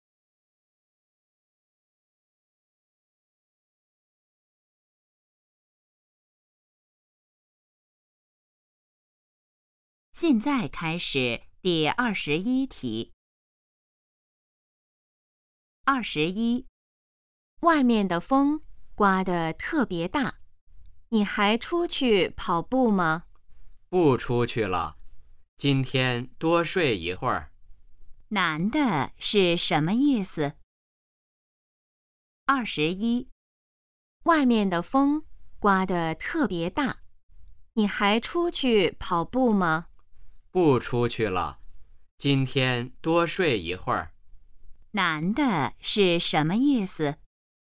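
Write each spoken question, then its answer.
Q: 男的是什么意思?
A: 今天不出去跑步了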